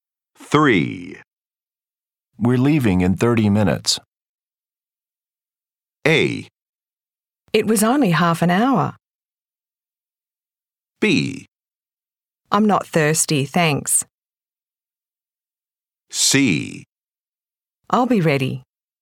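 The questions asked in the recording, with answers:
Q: We're leaving in 30 minutes.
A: C: I'll be ready.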